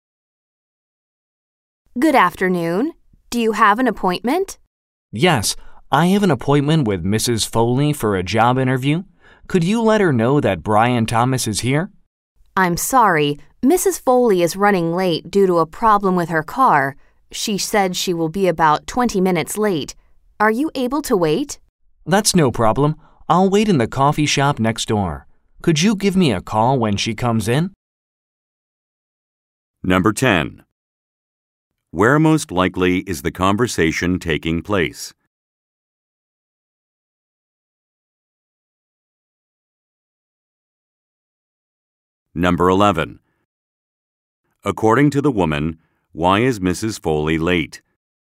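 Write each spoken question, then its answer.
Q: According to the woman, why is Mrs. Foley late?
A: She has a problem with her car

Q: What does the man ask the woman to do?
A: Call him when Mrs. Foley comes in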